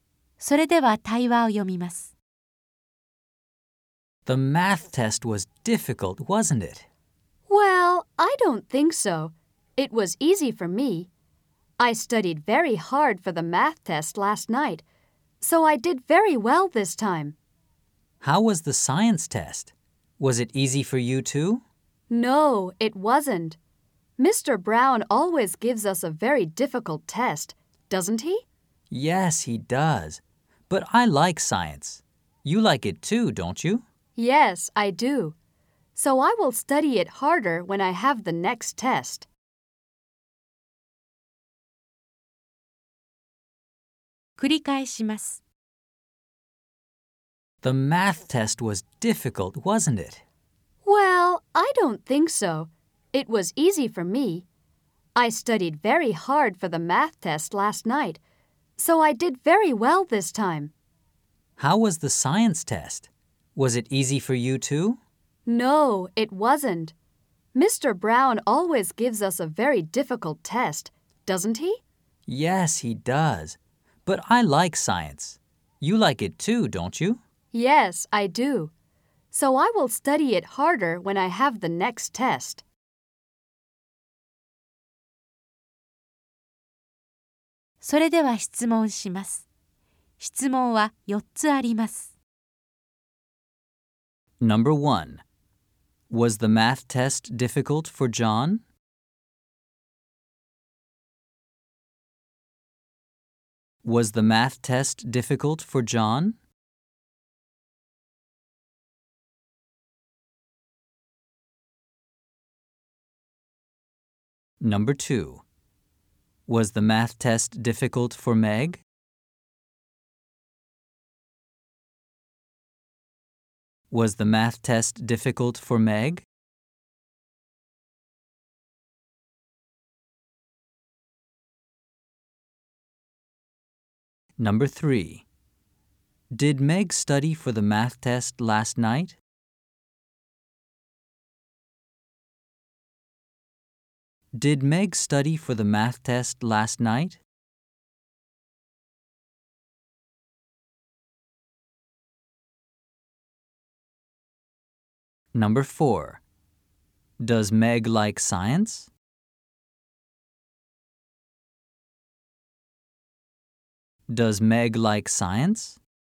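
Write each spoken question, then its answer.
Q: Does Meg like science?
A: Yes, she does.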